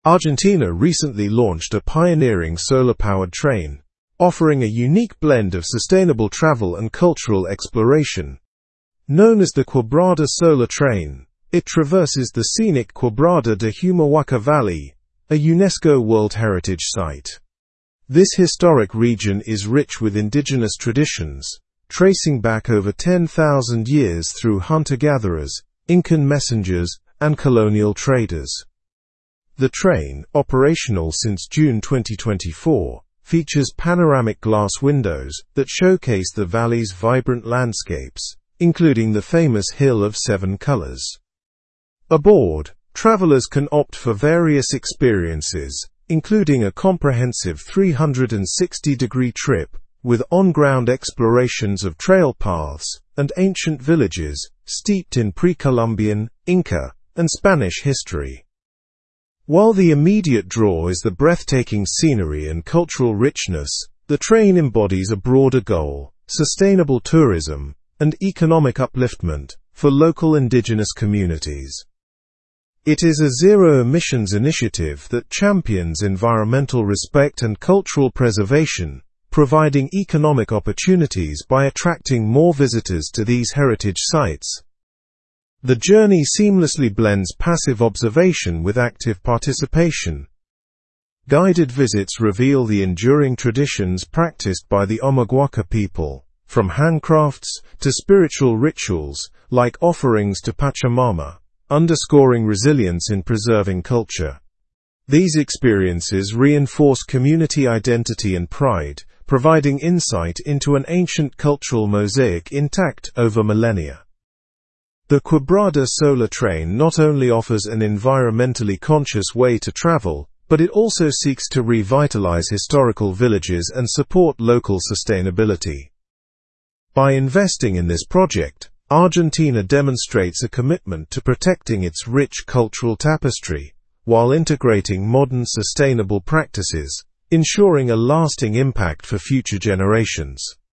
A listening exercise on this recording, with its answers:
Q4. When did the train begin operations?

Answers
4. The train became operational in June

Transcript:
Argentina recently launched a pioneering solar-powered train, offering a unique blend of sustainable travel and cultural exploration. Known as the Quebrada Solar Train, it traverses the scenic Quebrada de Humahuaca valley—a UNESCO World Heritage site. This historic region is rich with indigenous traditions, tracing back over 10,000 years through hunter-gatherers, Incan messengers, and colonial traders.
The train, operational since June 2024, features panoramic glass windows that showcase the valley's vibrant landscapes, including the famous Hill of Seven Colors. Aboard, travelers can opt for various experiences, including a comprehensive 360-degree trip with on-ground explorations of trail paths and ancient villages steeped in pre-Columbian, Inca, and Spanish history.
While the immediate draw is the breathtaking scenery and cultural richness, the train embodies a broader goal: sustainable tourism and economic upliftment for local indigenous communities. It is a zero-emissions initiative that champions environmental respect and cultural preservation, providing economic opportunities by attracting more visitors to these heritage sites.
The journey seamlessly blends passive observation with active participation. Guided visits reveal the enduring traditions practiced by the Omaguaca people, from handcrafts to spiritual rituals like offerings to Pachamama, underscoring resilience in preserving culture. These experiences reinforce community identity and pride, providing insight into an ancient cultural mosaic intact over millennia.
The Quebrada Solar Train not only offers an environmentally conscious way to travel but it also seeks to revitalize historical villages and support local sustainability. By investing in this project, Argentina demonstrates a commitment to protecting its rich cultural tapestry while integrating modern sustainable practices, ensuring a lasting impact for future generations.
Original news source: Ride Argentina&#x27;s first solar train through 10,000 years of Indigenous history (BBC)
2. Discuss the importance of sustainability in travel.
1. What is the Quebrada Solar Train?
Show model answerIt is a solar-powered train offering sustainable travel and cultural exploration in Argentina.
2. Through which site does the train travel?
integrating modern sustainable practices, ? a lasting impact for future generations.

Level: Level 4